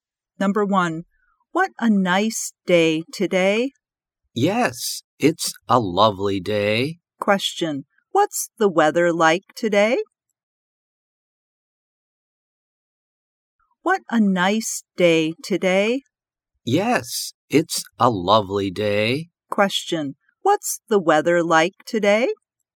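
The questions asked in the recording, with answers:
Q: what's the weather like today?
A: It's nice/lovely (fine).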